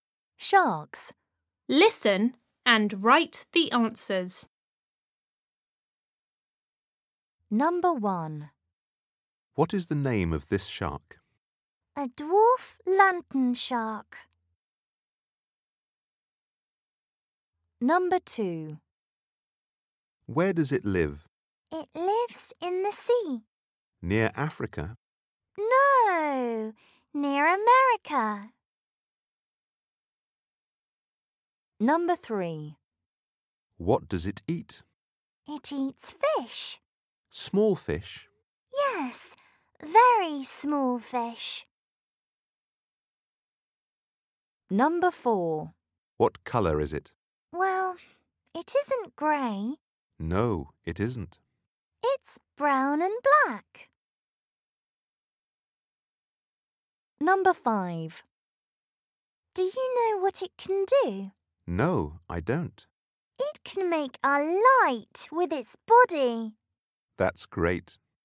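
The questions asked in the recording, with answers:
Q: What is the name of this shark?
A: A dwarf lantern shark

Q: Where does it live?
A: In the sea, near America

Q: What does it eat?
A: Very small fish

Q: What colour is it?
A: Brown and black

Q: Do you know what it can do?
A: It can make a light with its body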